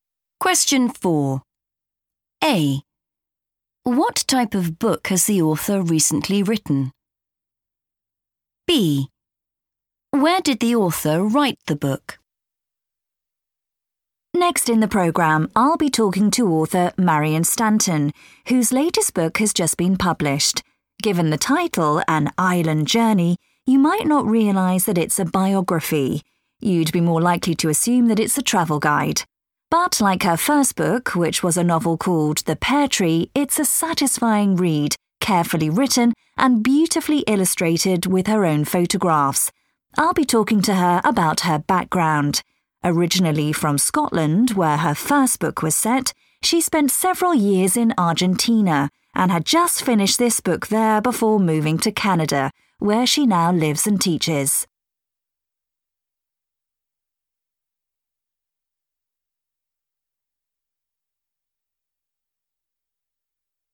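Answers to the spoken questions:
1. a biography
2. in Argentina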